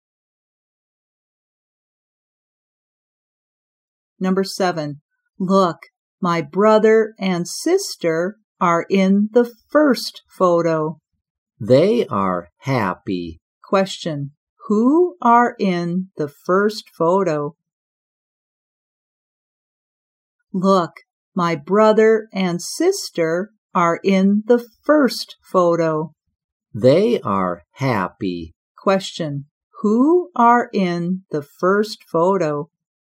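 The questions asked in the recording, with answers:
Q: who are in the first photo?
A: The speaker's brother and sister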